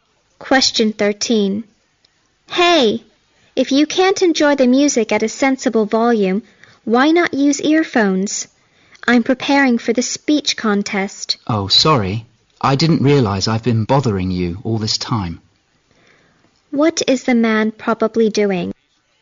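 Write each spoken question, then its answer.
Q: What is the man probably doing?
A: Playing music loudly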